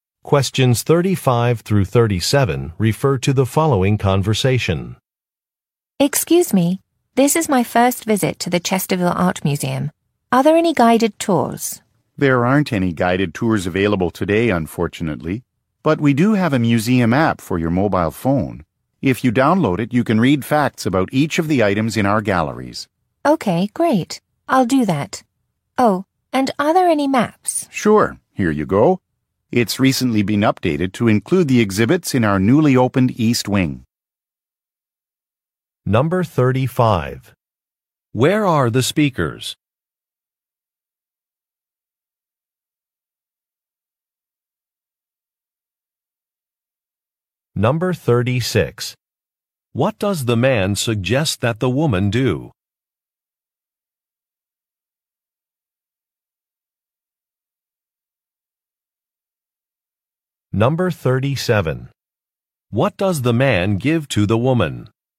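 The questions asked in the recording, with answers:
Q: Where are the speakers?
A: At an art museum

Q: What does the man suggest that the woman do?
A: Download a museum app

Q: What does the man give to the woman?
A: A map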